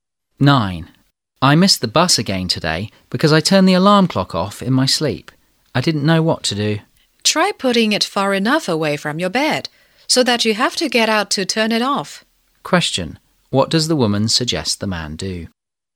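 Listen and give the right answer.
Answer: Put the alarm clock far away from his bed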